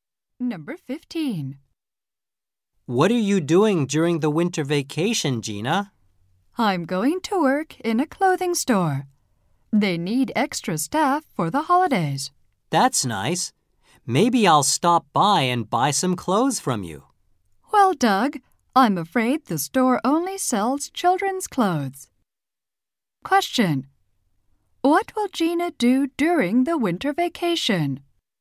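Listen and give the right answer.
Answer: Work in a children's clothing store.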